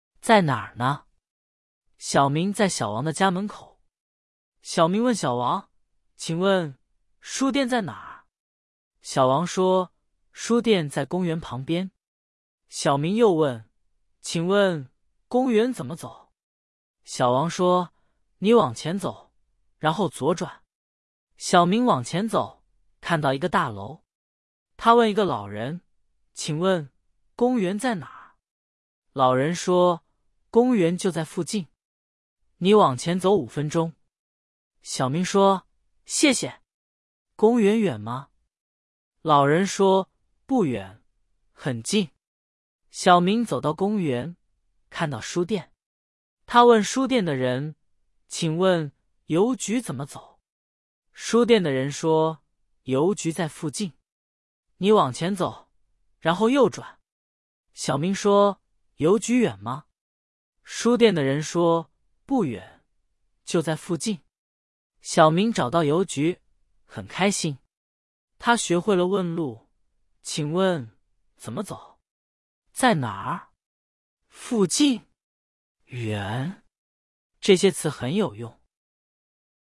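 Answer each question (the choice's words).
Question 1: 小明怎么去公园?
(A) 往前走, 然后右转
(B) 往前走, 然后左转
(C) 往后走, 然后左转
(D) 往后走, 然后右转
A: 往前走, 然后左转

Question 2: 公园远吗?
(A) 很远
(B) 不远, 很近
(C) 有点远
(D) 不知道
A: 不远, 很近

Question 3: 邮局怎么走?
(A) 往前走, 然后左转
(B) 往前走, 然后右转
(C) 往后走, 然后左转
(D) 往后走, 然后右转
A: 往前走, 然后右转

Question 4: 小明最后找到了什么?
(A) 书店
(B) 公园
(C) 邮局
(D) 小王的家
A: 邮局

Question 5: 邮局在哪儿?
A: 在附近

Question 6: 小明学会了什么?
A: 学会了问路

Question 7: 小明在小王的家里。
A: 错

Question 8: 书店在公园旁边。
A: 对

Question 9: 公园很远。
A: 错

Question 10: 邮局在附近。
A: 对

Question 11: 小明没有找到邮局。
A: 错

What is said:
在哪儿呢
小明在小王的家门口。小明问小王:"请问,书店在哪儿?"小王说:"书店在公园旁边。"小明又问:"请问,公园怎么走?"小王说:"你往前走,然后左转。"
小明往前走,看到一个大楼。他问一个老人:"请问,公园在哪儿?"老人说:"公园就在附近。你往前走五分钟。"小明说:"谢谢。公园远吗?"老人说:"不远,很近。"
小明走到公园,看到书店。他问书店的人:"请问,邮局怎么走?"书店的人说:"邮局在附近。"小明说:"邮局远吗?"书店的人说:"不远,就在附近。
小明找到邮局,很开心。他学会了问路:"请问,怎么走?在哪儿?附近?远?"这些词很有用。

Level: Beginner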